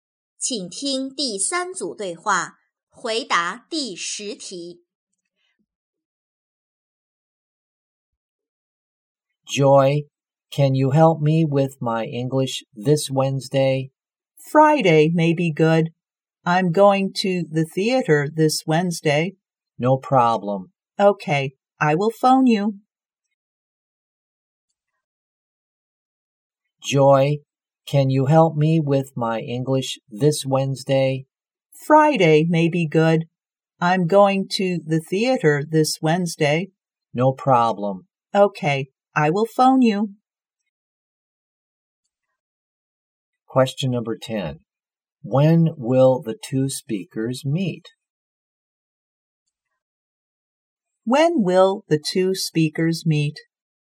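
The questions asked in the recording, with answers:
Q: When will the two speakers meet?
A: On Friday.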